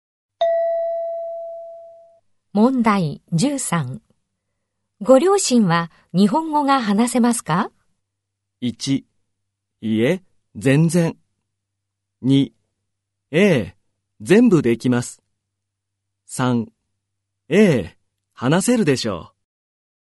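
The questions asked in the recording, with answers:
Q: ご両親は日本語が話せますか?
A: 1: いえ、全然。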